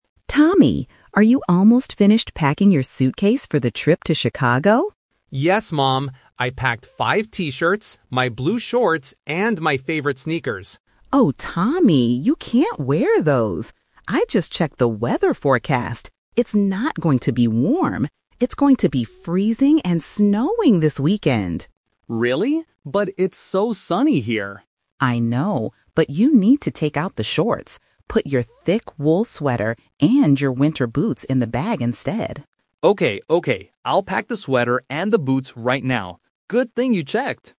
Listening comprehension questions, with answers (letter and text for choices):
Listen to the conversation between a mother and her son, then choose the correct answer (A, B, or C).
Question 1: What is the weather going to be like in Chicago?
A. Sunny and warm.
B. Freezing and snowing.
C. Rainy and windy.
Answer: B. Freezing and snowing.

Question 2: What did Tommy originally pack in his suitcase?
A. A thick wool sweater.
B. Winter boots and a jacket.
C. T-shirts, shorts, and sneakers.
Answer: C. T-shirts, shorts, and sneakers.

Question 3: What does Tommy's mom tell him to put in the bag instead?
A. A thick sweater and winter boots.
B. His favorite sneakers and T-shirts.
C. A warm coat and a scarf.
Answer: A. A thick sweater and winter boots.

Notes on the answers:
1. The mother says, "It's going to be freezing and snowing this weekend!" Option (A) is the trap; Tommy mentions it is "sunny here" (at their current location), not in Chicago. Option (C) is not mentioned in the audio.
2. Tommy says, "I packed five T-shirts, my blue shorts, and my favorite sneakers." Option (A) and (B) are what he needs to pack later, not what he originally packed.
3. This tests the "Twist" (the change of plans). Because of the weather, the mom tells him to pack his "thick wool sweater and your winter boots... instead." Option (B) is the trap; these are the items he must take out or not use. Option (C) contains plausible winter clothes, but they are not mentioned in the dialogue.

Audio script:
Mom: Tommy, are you almost finished packing your suitcase for the trip to Chicago?
Tommy: Yes, Mom. I packed five T-shirts, my blue shorts, and my favorite sneakers.
Mom: Oh, Tommy, you can't wear those. I just checked the weather forecast. It's not going to be warm. It's going to be freezing and snowing this weekend!
Tommy: Really? But it's so sunny here.
Mom: I know, but you need to take out the shorts. Put your thick wool sweater and your winter boots in the bag instead.